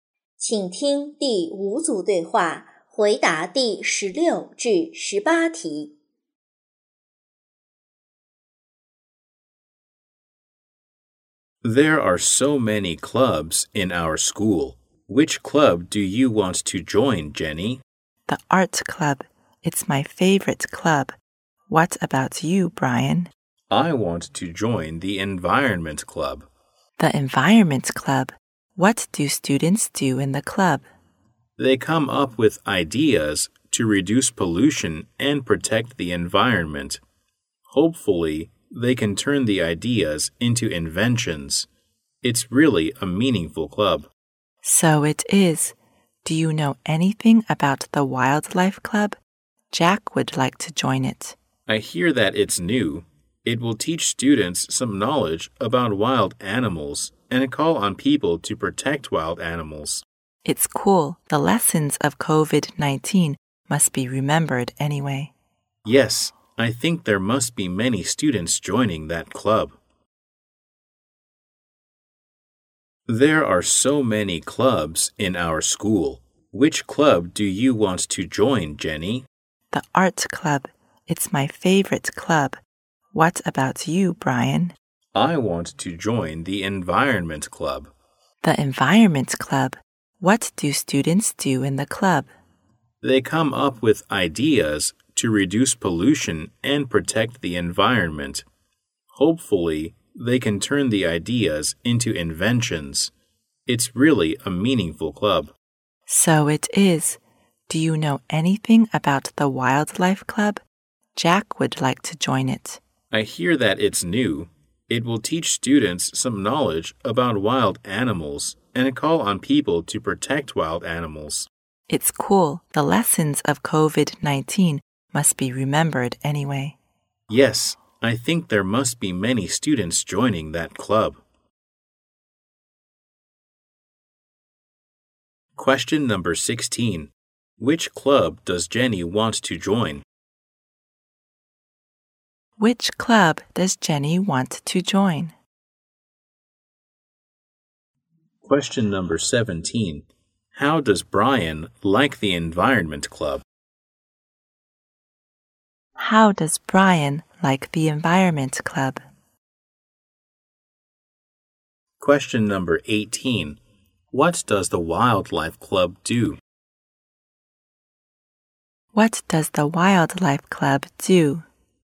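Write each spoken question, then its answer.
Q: Which club does Jenny want to join?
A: The art club

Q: How does Brian like the environment club?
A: He thinks it's really meaningful

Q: What does the Wildlife Club do?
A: It teaches students about wild animals and calls on people to protect them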